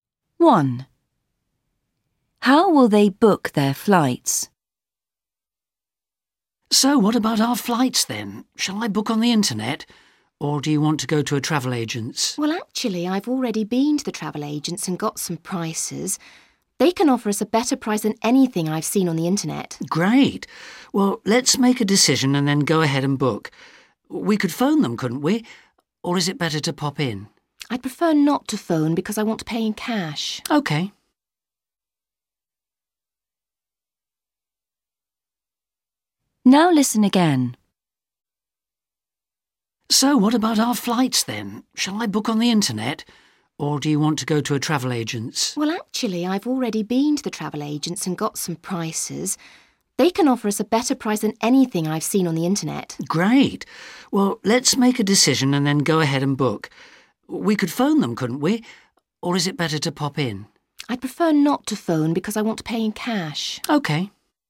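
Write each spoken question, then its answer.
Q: How will they book their flights?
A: In person at the travel agent's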